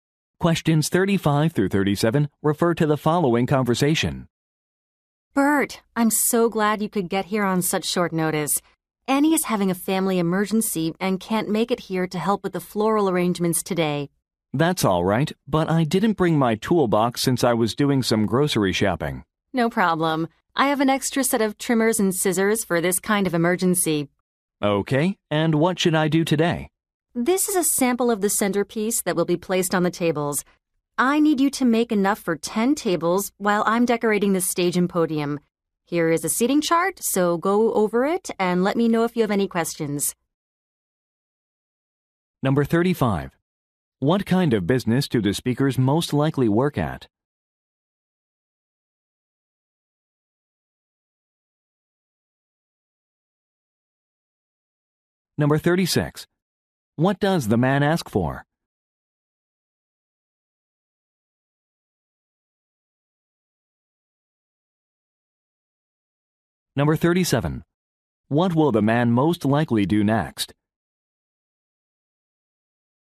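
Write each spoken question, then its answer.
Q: What kind of business do the speakers most likely work at?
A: A florist

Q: What will the man most likely do next?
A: Make centerpieces for 10 tables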